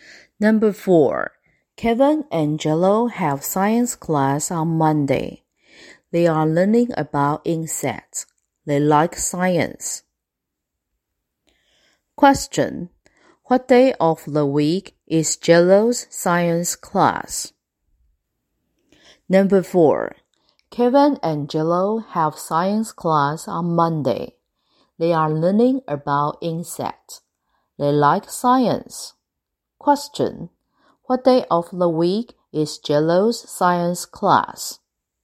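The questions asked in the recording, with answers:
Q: Question, what day of the week is Jello's science class?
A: Monday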